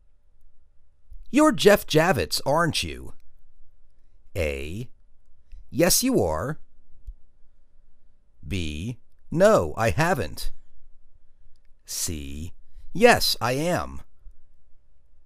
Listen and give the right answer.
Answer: Yes I am.